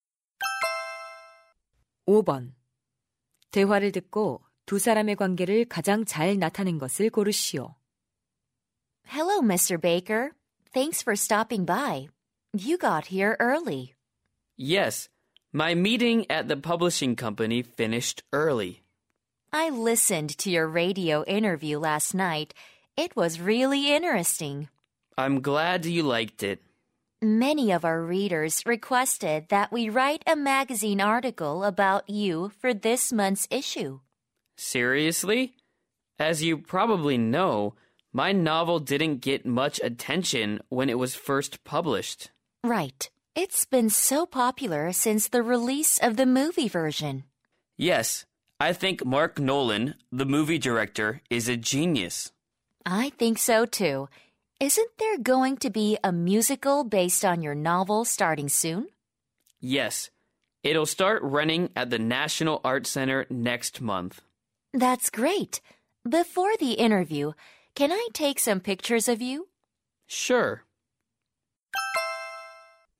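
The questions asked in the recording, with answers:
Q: 대화를 듣고 두 사람의 관계를 가장 잘 나타낸 것을 고르시오.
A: 잡지 기자 - 소설가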